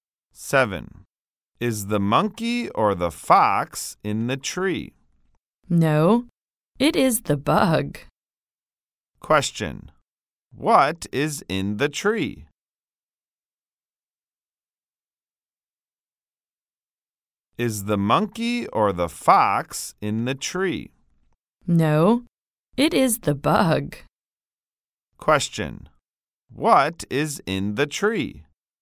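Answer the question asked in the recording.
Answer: The bug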